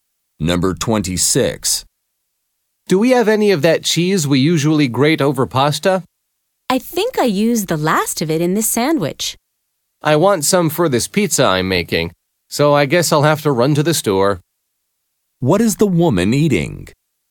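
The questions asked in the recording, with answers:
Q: What is the woman eating?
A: A sandwich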